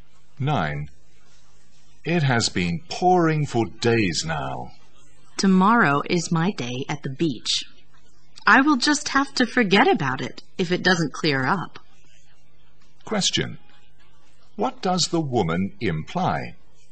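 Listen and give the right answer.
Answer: She will cancel her beach trip if the rain doesn't stop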